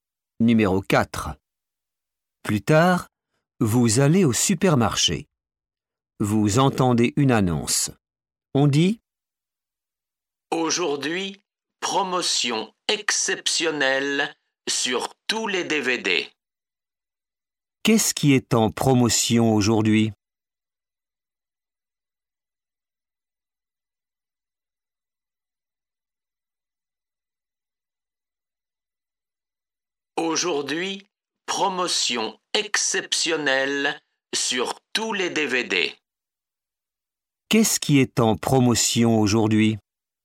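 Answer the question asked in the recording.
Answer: Les DVD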